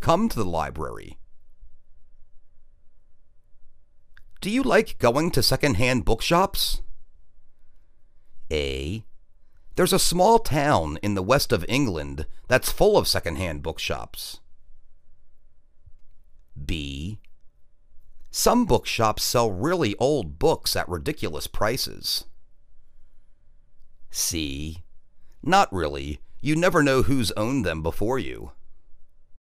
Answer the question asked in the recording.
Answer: Not really. You never know who's owned them before you.